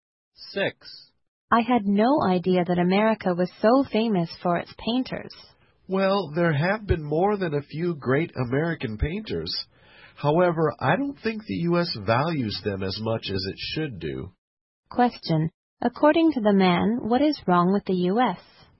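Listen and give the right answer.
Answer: It does not value its painters as much as it should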